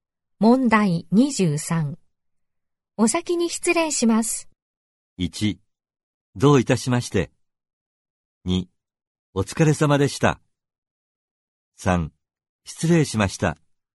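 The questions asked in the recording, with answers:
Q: お先に失礼します。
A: 2: お疲れ様でした。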